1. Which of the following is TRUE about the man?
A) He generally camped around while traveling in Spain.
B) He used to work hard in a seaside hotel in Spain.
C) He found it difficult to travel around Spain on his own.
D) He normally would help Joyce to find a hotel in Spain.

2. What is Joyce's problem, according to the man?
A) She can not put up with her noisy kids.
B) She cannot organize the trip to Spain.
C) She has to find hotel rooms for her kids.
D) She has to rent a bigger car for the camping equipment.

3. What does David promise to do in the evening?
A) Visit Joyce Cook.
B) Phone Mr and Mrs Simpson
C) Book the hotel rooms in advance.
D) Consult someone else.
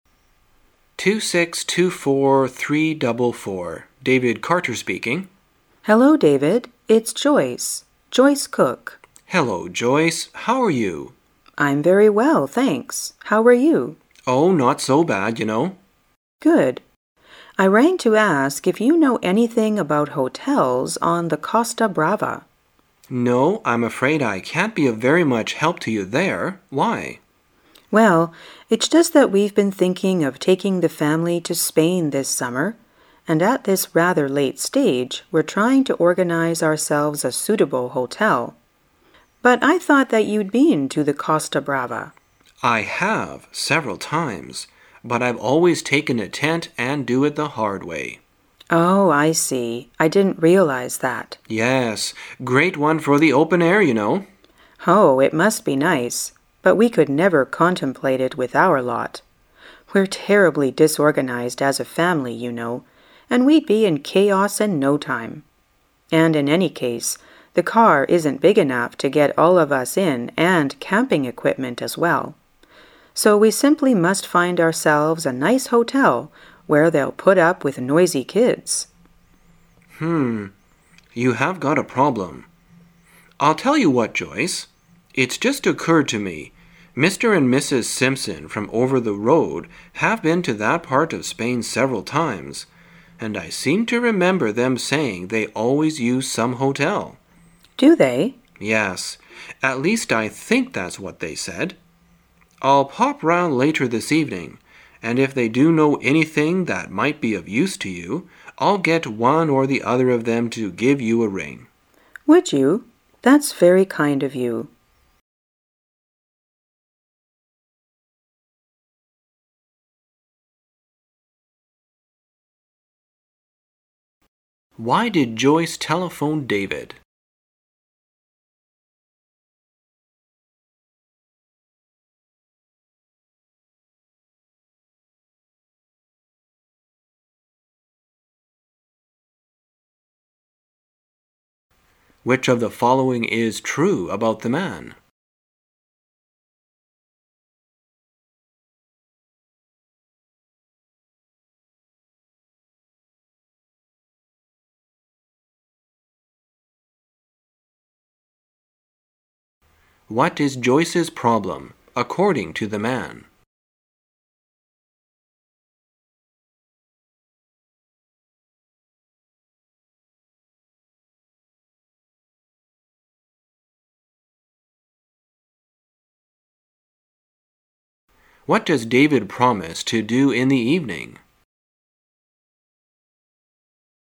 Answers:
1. A
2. C
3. D

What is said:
David Carter speaking. W: Hello, David, it's Joyce Joyce Cook. M: Hello Joyce, how are you? W: I'm very well thanks. How are you? M: Oh, not so bad, you know. W: Good. I rang to ask if you know anything about hotels on the Costa Brava. M: No, I'm afraid I can't be of very much help to you there, why? W: Well, it's just that we've been thinking of taking the family to Spain this summer and at this rather late stage we're trying to organise ourselves a suitable hotel. But I thought that you'd been to the Costa Brava. M: I have. Several times. But I've always taken a tent and do it the hard way. W: Oh I see. I didn't realise that. M: Yes. Great one for the open air, you know. W: Oh. It must be nice, but we could never contemplate it with our lot. We're terribly disorganised as a family, you know, and we'd be in chaos in no time. And in any case the car isn't big enough to get all of us in and camping equipment as well, so we simply must find ourselves a nice hotel where they' 11 put up with noisy kids. You have got a problem. I tell you what, Joyce. It's just occurred to me-Mr, and Mrs. Simpson from over the road have been to that part of Spain several times, and I seem to remember them saying they always use some hotel. W: Do they? M: Yes. At least I think that's what they said. I'll pop round later this evening, and if they do know anything that might be of use to you I' 11 get one or the other of them to give you a ring. W: Would you? That's very kind of you. Why did Joyce telephone David?

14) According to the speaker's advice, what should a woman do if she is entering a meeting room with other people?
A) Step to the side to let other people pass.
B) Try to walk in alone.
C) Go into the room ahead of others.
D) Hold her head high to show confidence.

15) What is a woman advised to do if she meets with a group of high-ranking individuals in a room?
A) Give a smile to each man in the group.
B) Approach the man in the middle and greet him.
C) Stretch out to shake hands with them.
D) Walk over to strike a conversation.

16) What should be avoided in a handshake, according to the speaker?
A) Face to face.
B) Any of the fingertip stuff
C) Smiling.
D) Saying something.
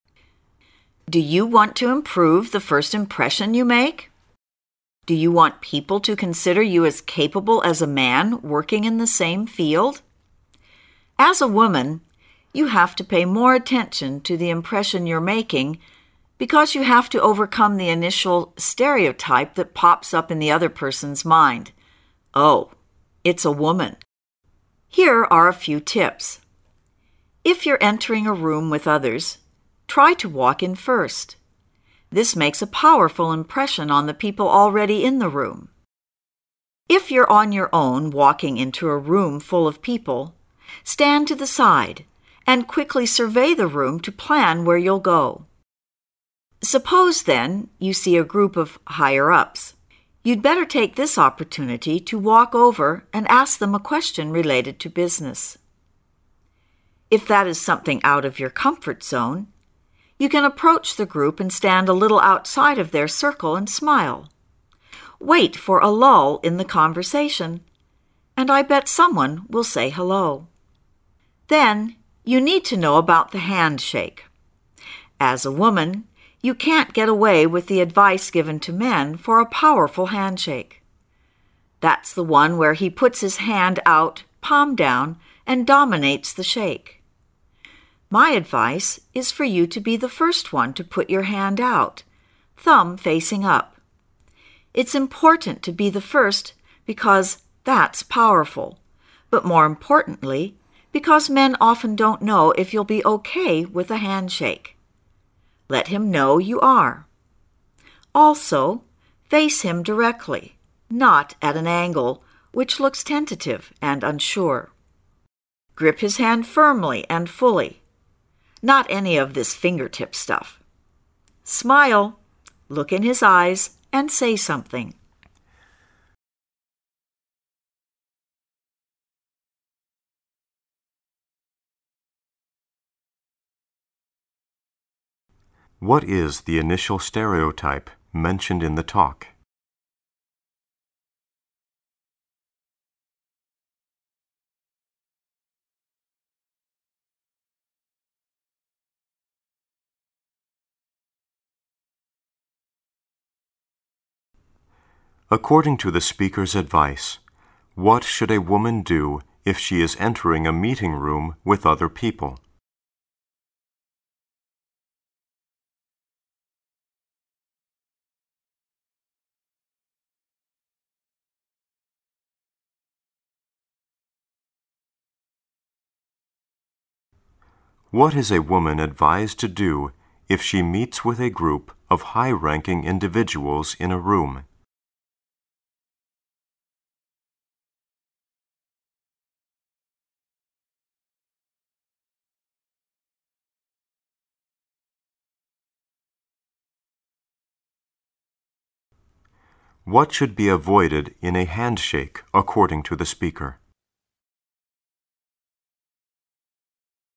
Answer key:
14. C
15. D
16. B

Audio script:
A
[解析] 23-26 Do you want to improve the first impression you make? Do you want people to consider you as capable as a man working in the same field? As a woman, you have to pay more attention to the impression you're making because you have to overcome the initial stereotype that pops up in the other person's mind, "Oh, it's a woman. " Here are a few tips. If you're entering a room with others, try to walk in first. This makes a powerful impression on the people already in the room. If you' re on your own walking into a room full of people, stand to the side and quickly survey the room to plan where you'll go. Suppose then you see a group of higher-ups, you'd better take this opportunity to walk over and ask them a question related to business. If that is something out of your comfort zone, you can approach the group and stand a little outside of their circle and smile, wait for a lull in the conversation, and I bet someone will say hello. Then, you need to know about the handshake. As a woman, you can't get away with the advice given to men for a powerful handshake. That's the one where he puts his hand out palm down and dominates the shake. My advice is for you to be the first one to put your right hand out, thumb facing up. It's important to be the first because that's powerful, but more importantly, because men often don't know if you'll be okay with a handshake. Let him know you are. Also, face him directly—not at an angle, which looks tentative and unsure. Grip his hand firmly and fully—not any of this fingertip stuff. Smile, look in his eyes, and say something. What is the initial stereotype mentioned in the talk?

